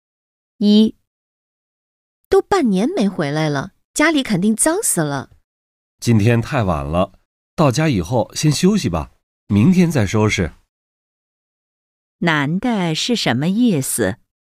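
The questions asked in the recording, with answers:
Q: 男的是什么意思?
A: 今天先休息,明天再收拾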